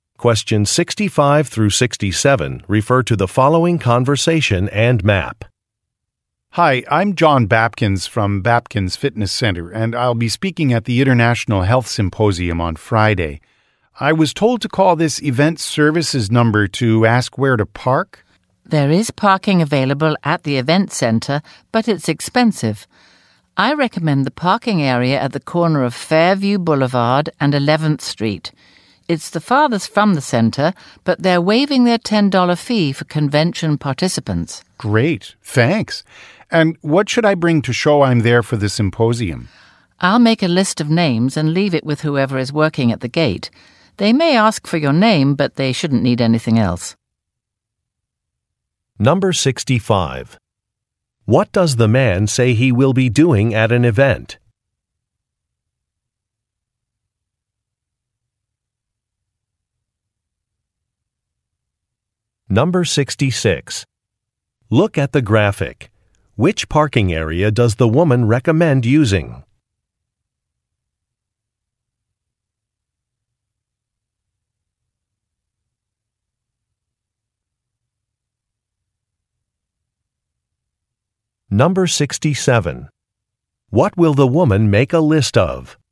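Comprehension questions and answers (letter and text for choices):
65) What does the man say he will be doing at an event?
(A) Working at a ticket booth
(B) Giving a presentation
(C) Filming a performance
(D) Leading a fitness class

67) What will the woman make a list of?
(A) Event participants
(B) Security personnel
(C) Nearby restaurants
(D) Conference topics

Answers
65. (B) Giving a presentation
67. (A) Event participants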